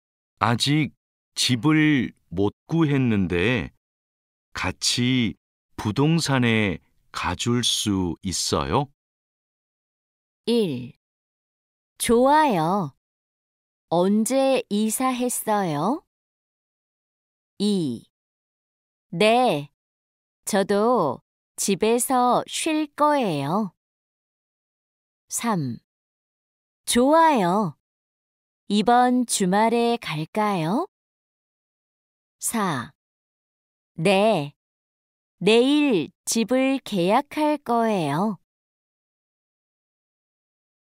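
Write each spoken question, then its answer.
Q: 아직 집을 못 구했는데 같이 부동산에 가줄 수 있어요?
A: 3: 좋아요. 이번 주말에 갈까요?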